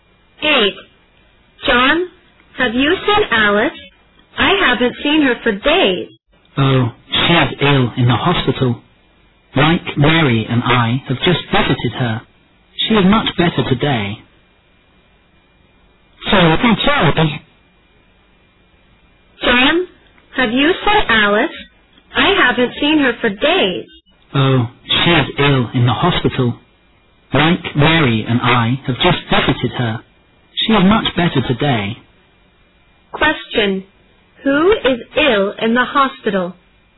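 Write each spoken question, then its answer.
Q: Who is ill in the hospital?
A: Alice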